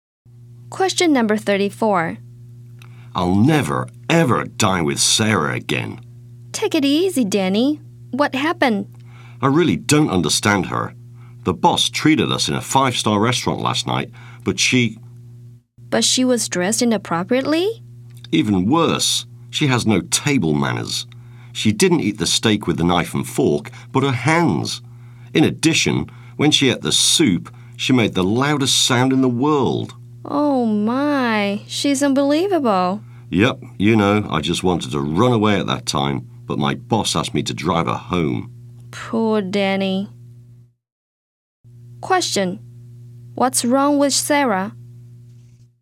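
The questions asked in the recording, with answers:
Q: What's wrong with Sarah?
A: She has no table manners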